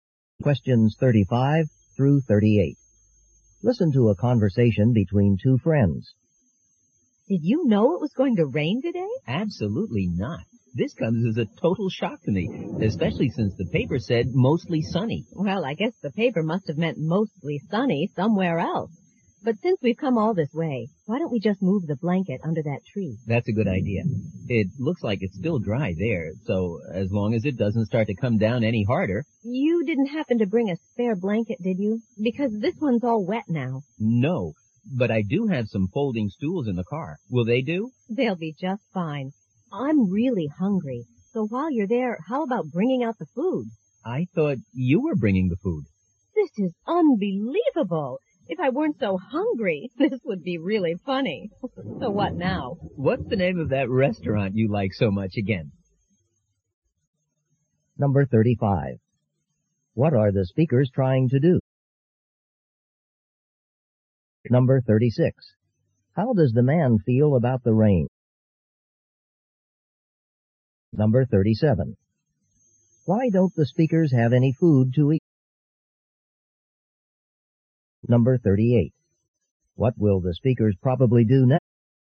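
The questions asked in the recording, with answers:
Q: What are the speakers trying to do?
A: Have a picnic

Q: How does the man feel about the rain?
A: He is surprised by it

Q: Why don't the speakers have any food to eat?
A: Each thought the other was bringing the food

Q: What will the speakers probably do next?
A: Go to a restaurant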